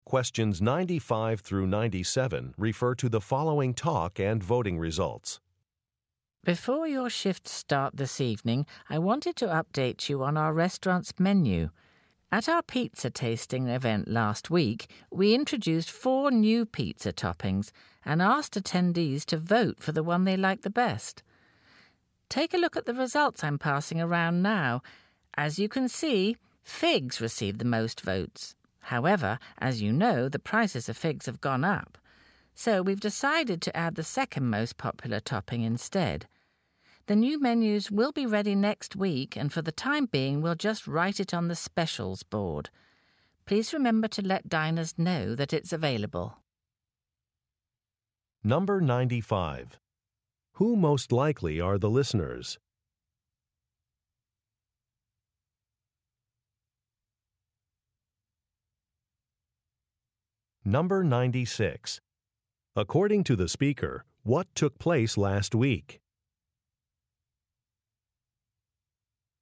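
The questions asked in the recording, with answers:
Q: Who most likely are the listeners?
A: Restaurant staff

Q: According to the speaker, what took place last week?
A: A pizza tasting event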